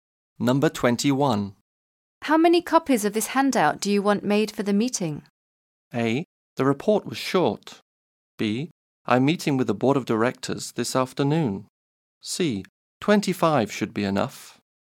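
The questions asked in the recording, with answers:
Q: How many copies of this handout do you want made for the meeting?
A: C: 25 should be enough.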